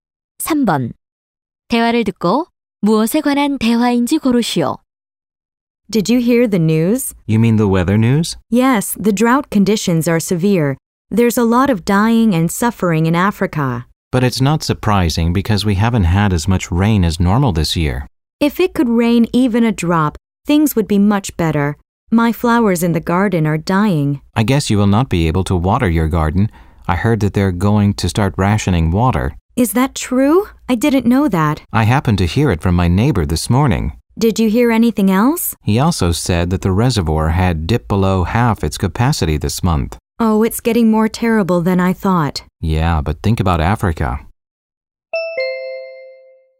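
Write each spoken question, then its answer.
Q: 대화를 듣고 무엇에 관한 대화인지 고르시오.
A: 가뭄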